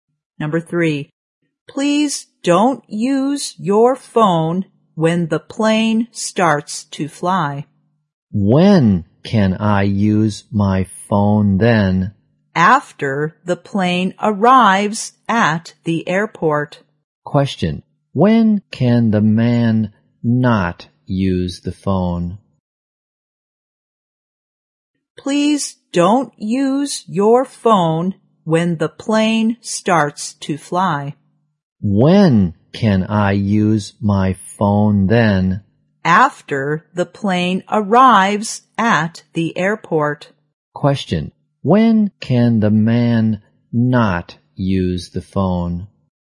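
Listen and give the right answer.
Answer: When the plane starts to fly.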